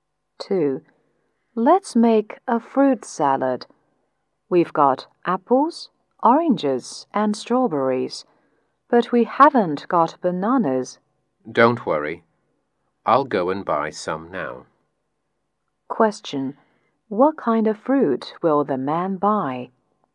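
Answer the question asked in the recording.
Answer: Bananas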